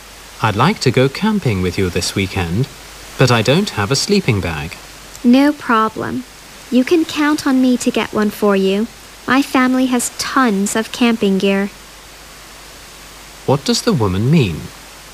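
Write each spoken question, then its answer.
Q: What does the woman mean?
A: She will get a sleeping bag for the man; her family has plenty of camping gear.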